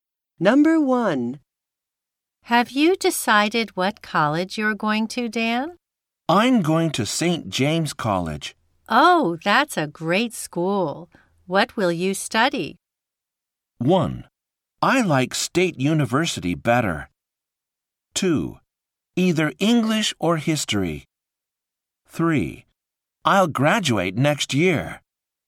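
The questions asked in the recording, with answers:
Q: What will you study?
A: 2: Either English or history.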